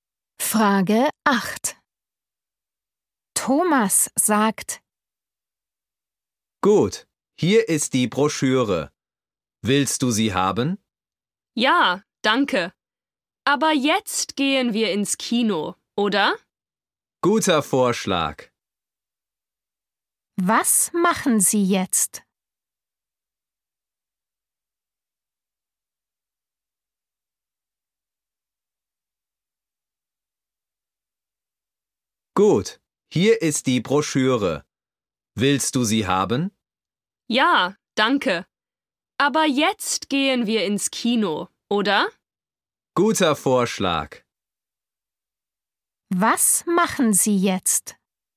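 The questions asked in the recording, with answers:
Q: Was machen Sie jetzt?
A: Sie gehen ins Kino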